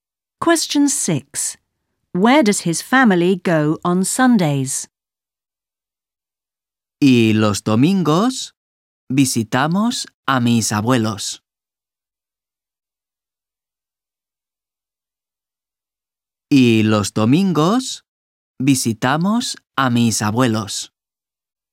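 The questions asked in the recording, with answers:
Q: Where does his family go on Sundays?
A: To visit his grandparents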